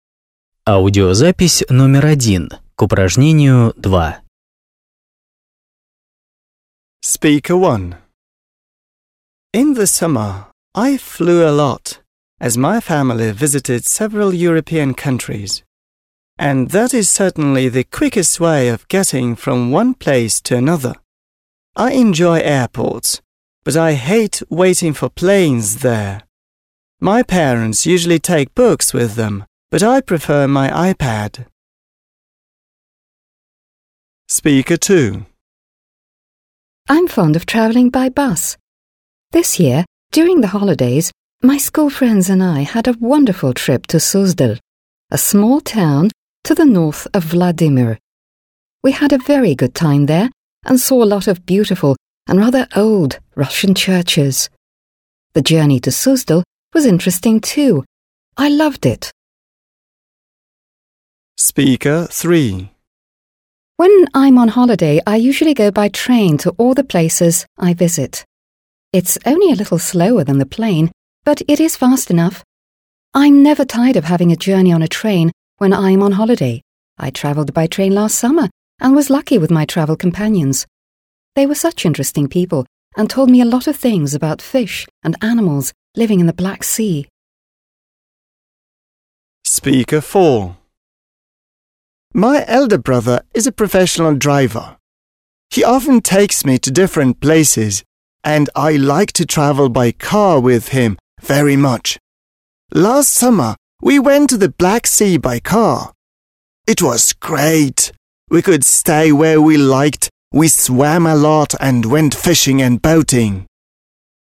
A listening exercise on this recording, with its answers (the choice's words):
2. Послушайте, как четыре человека говорят о своем отпуске. Сравните приведенные ниже утверждения (a-e) и слова выступающих (1-4). Есть одно утверждение, которое тебе не нужно использовать.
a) The speaker says he spent his holiday together with his relative.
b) The speaker says he went abroad during his summer holidays.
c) The speaker says he began to like the Black Sea fauna.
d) The speaker says he learnt a lot of new things about the Black Sea fauna.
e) The speaker says that during his holiday he saw some ancient Russian buildings.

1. Speaker 1.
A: The speaker says he went abroad during his summer holidays.

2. Speaker 2.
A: The speaker says that during his holiday he saw some ancient Russian buildings.

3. Speaker 3.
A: The speaker says he learnt a lot of new things about the Black Sea fauna.

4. Speaker 4.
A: The speaker says he began to like the Black Sea fauna.

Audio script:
In the summer I flew a lot, cause my family visited several European countries. And that is certainly the quickest way of getting from one place to another. I enjoy airports but I hate waiting for planes there. My parents usually take books with them but I prefer my iPad.
I'm fond of travelling by bus. This year during the holidays my school friends and I had a wonderful trip to Suzdal, a small town to the north of Vladimir. We had a very good time during the journey and saw a lot of beautiful and rather old Russian churches, The way to Suzdal was interesting too. I loved it.
When I'm on holiday, I usually go by train to all the places I visit. It's only a little slower than by plane, but it is fast enough. I'm never tired of having a journey on the train when I'm on holiday. I travelled by train last summer and I was lucky with my travelling companions. They were such interesting people and told me a lot of things about fish and animals living in the Black Sea.
My elder brother is a professional driver. He often takes me to different places and I like to travel by car with him very much. Last summer we went to the Black Sea by car. It was great! We could stay where we liked. We swam a lot and went fishing and boating.

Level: 8 класс